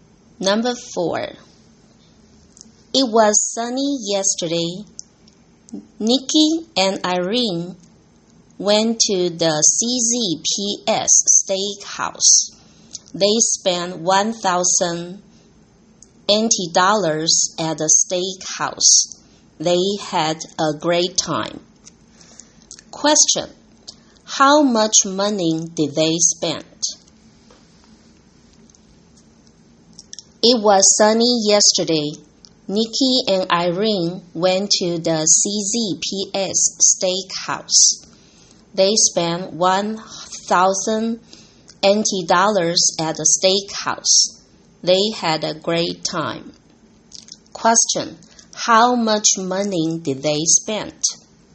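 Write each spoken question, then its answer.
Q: How much money did they spend?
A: $1,000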